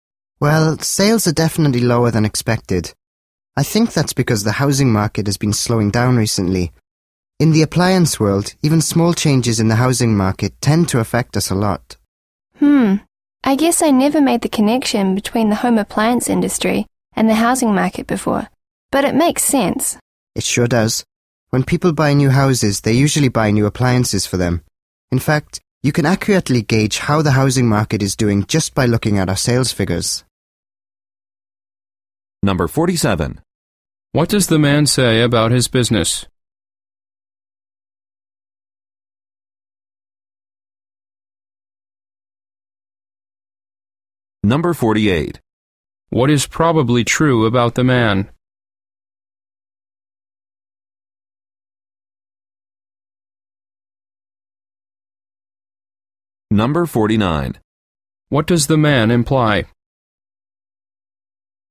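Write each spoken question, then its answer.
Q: What does the man say about his business?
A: Sales are lower than expected.

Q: What is probably true about the man?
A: He works in the home appliance industry.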